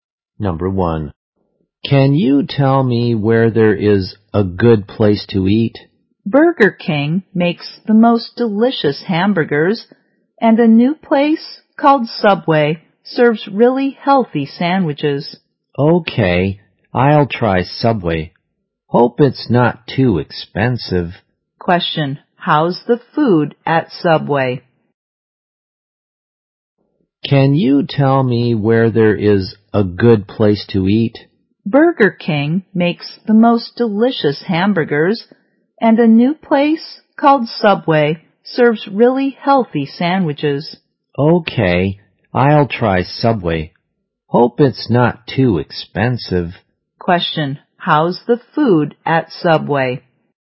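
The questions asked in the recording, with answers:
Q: how's the food at Subway?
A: Really healthy.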